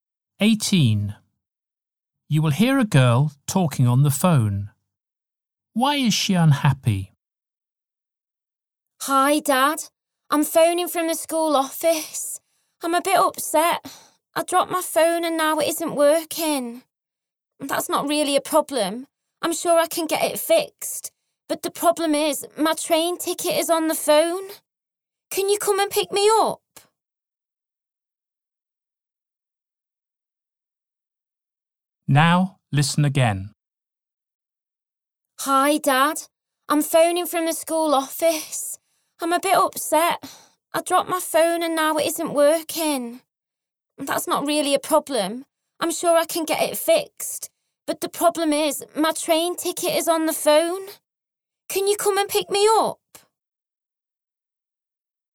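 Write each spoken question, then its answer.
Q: Why is she unhappy?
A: Her train ticket is on her broken phone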